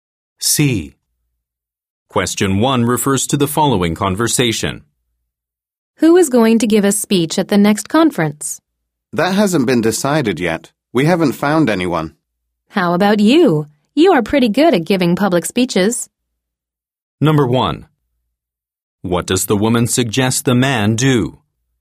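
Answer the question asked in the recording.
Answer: Give a speech at the next conference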